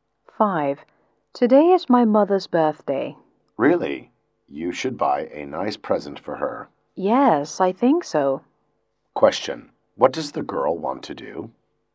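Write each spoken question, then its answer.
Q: What does the girl want to do?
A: Buy a present for her mother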